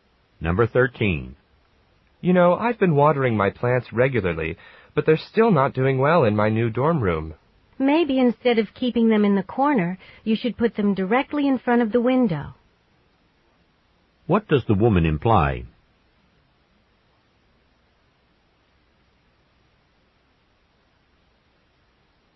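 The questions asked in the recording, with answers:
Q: What does the woman imply?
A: The plants need more sunlight.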